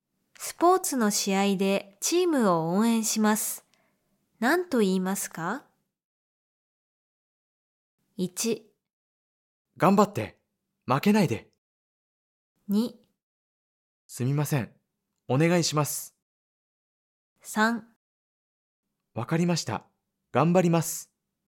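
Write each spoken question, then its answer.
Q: スポーツの試合でチームを応援します。何と言いますか?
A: 1: 頑張って、負けないで。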